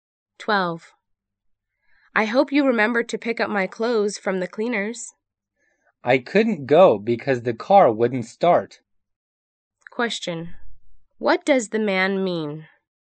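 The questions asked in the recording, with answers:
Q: What does the man mean?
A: He didn't pick up the clothes because the car wouldn't start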